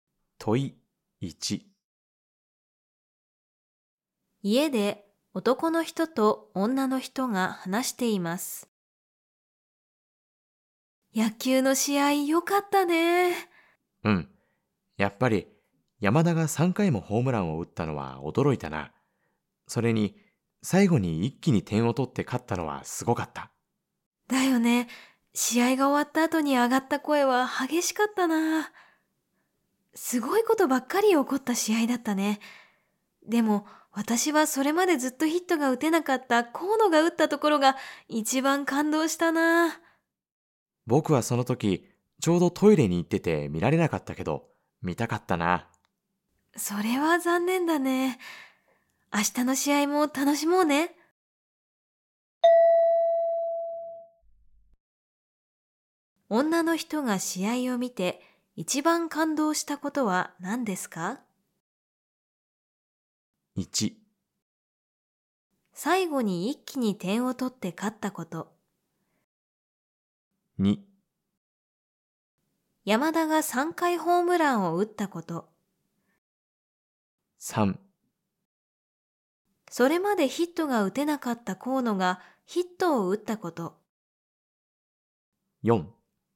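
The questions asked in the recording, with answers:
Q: 女の人が試合を見て一番感動したことは何ですか?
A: 3: それまでヒットが打てなかった河野がヒットを打ったこと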